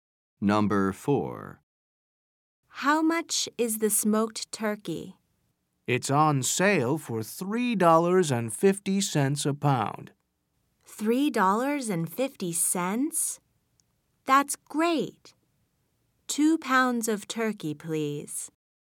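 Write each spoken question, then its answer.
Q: How much is the smoked turkey?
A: $3.50 a pound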